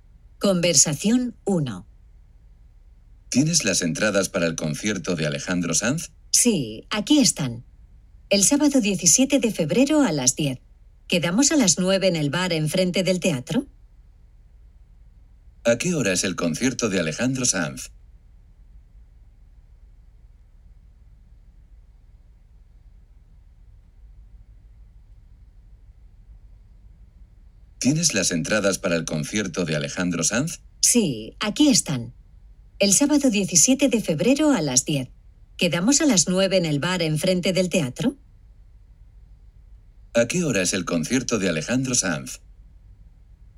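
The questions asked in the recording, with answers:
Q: ¿A qué hora es el concierto de Alejandro Sanz?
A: A las 10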